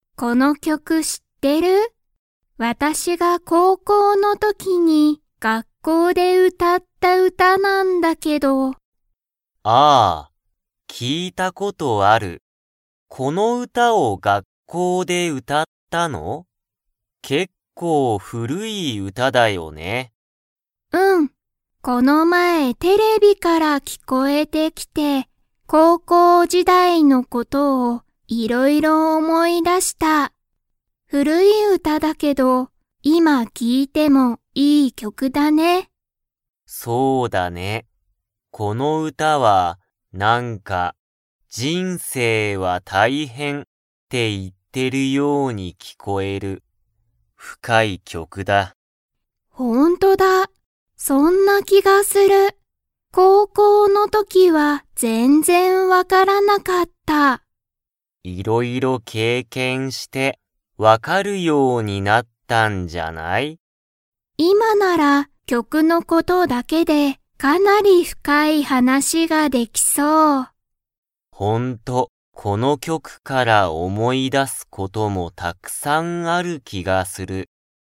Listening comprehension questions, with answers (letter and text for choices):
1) ササキさんは、「この曲きょく」を聞きいて何なにを思おもい出だしましたか?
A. 歌うた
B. 人生じんせい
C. 深ふかい話はなし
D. 高校こうこう時代じだい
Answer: D. 高校こうこう時代じだい

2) ササキさんは、高校こうこうの時とき「この曲きょく」が深ふかい歌うただと 。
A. わかっていた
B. わからなかった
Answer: B. わからなかった

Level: Level 3